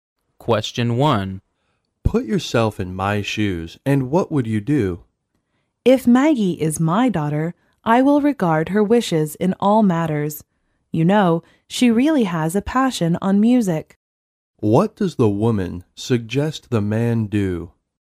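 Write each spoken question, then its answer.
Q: What does the woman suggest the man do?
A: Respect Maggie's wishes and let her pursue music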